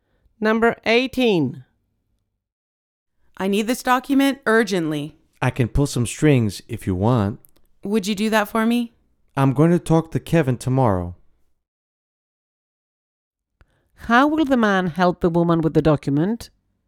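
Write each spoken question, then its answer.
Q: How will the man help the woman with the document?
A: By talking to Kevin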